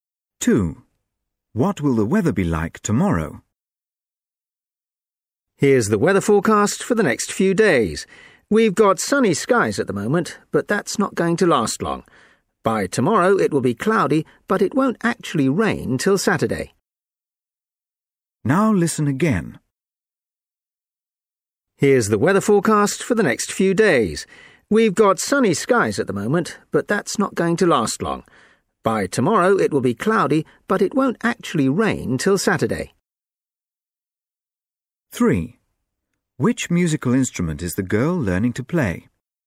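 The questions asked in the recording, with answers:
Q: What will the weather be like tomorrow?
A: cloudy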